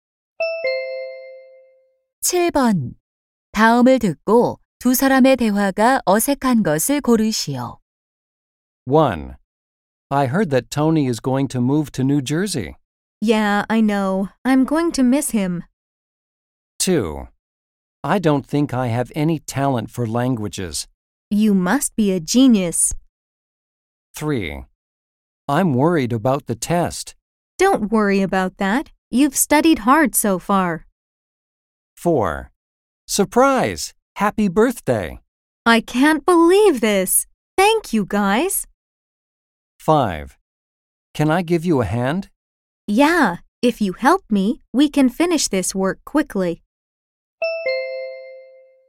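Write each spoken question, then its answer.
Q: 다음을 듣고 두 사람의 대화가 어색한 것을 고르시오.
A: 2: I don't think I have any talent for languages. / You must be a genius.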